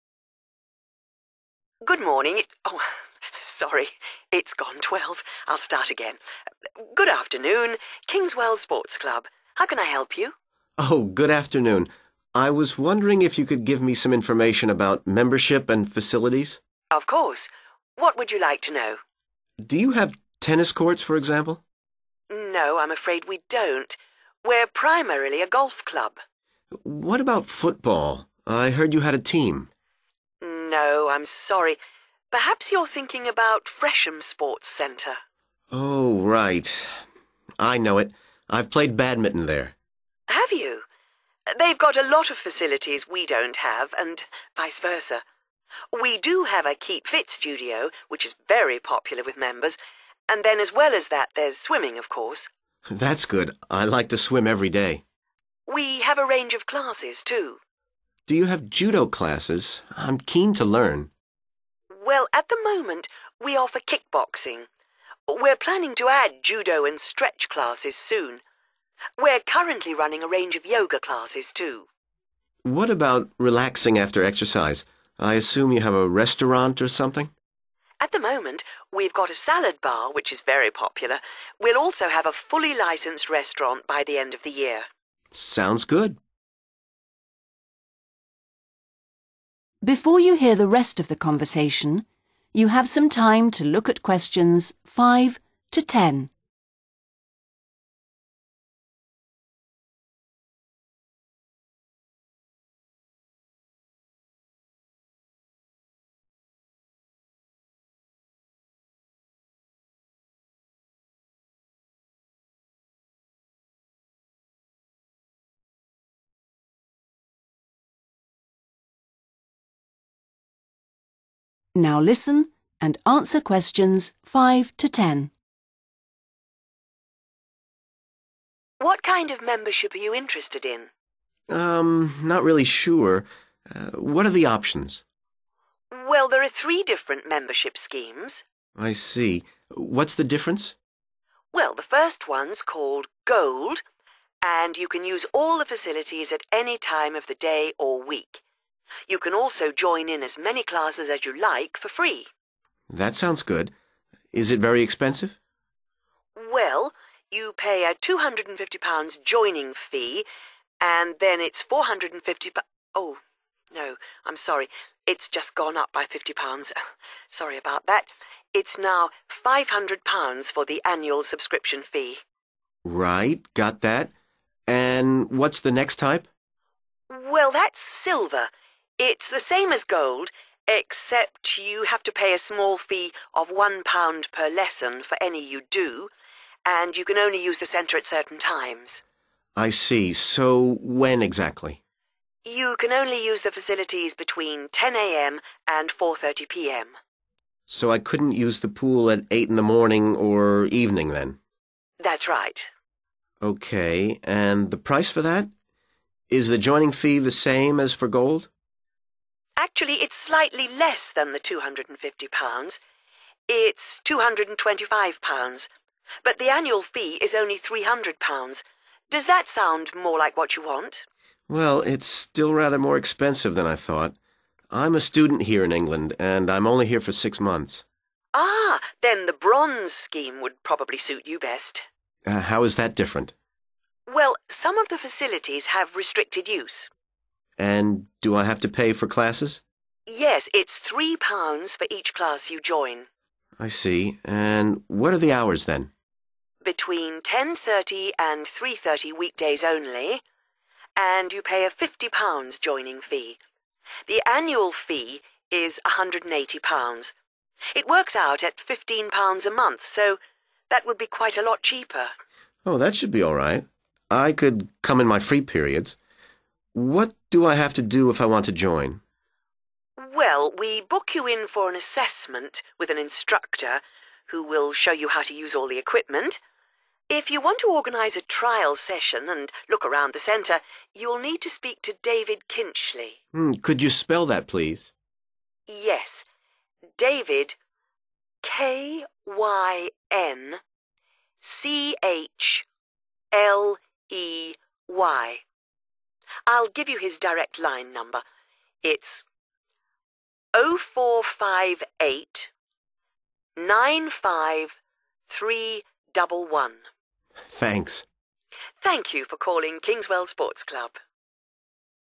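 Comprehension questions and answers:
Complete the sentences below, using NO MORE THAN TWO WORDS for each answer.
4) Additional facility: 4.......................(restaurant opening soon)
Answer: salad bar

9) To join the centre, you need to book an instructor's ...............................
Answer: assessment

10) To book a trial session, speak to David ....................... (0458 95311).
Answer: Kynchley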